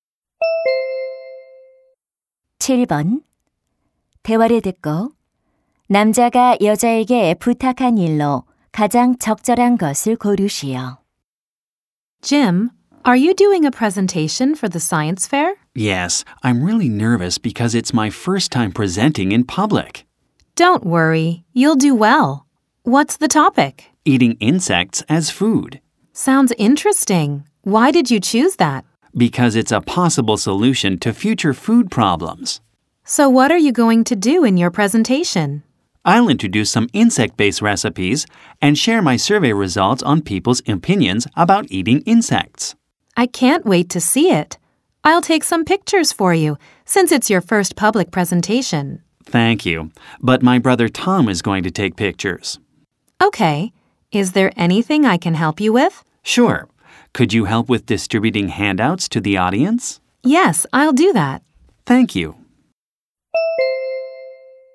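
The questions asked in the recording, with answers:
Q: 대화를 듣고 남자가 여자에게 부탁한 일로 가장 적절한 것을 고르시오.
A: 청중에게 유인물 나눠 주기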